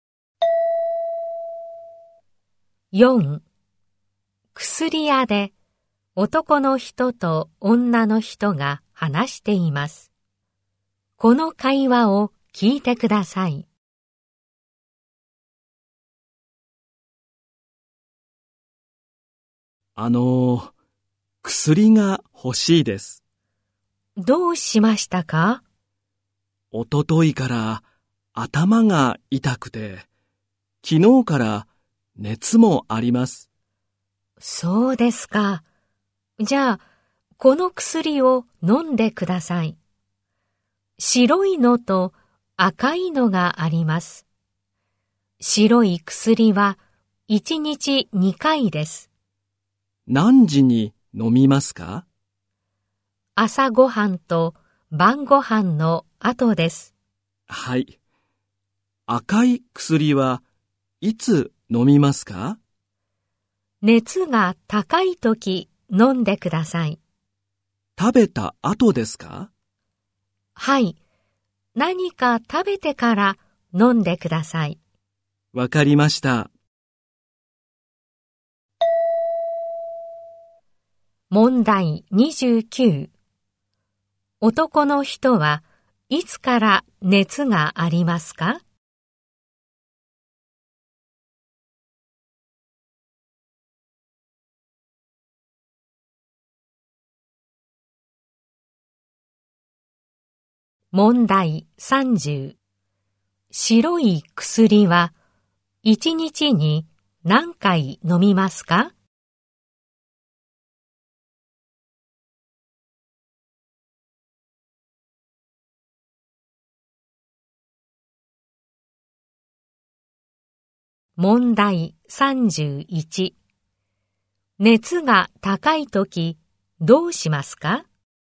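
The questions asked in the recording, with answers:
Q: 男の人はいつから熱がありますか?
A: 昨日から

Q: 白い薬は1日に何回飲みますか?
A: 2回

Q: 熱が高いときどうしますか?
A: 何か食べてから赤い薬を飲む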